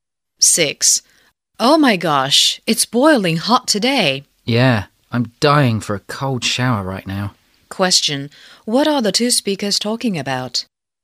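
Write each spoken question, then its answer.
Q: What are the two speakers talking about?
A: The hot weather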